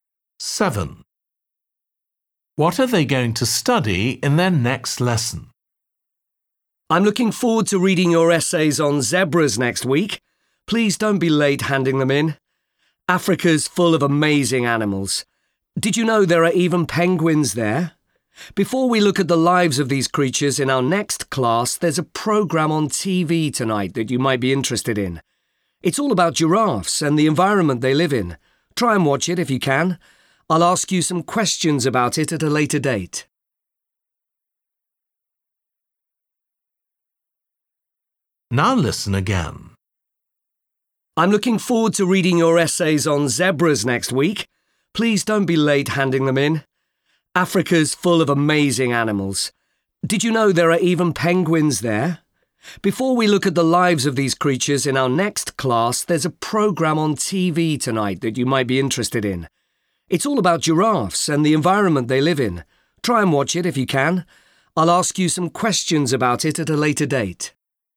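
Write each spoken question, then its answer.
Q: What are they going to study in their next lesson?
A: Penguins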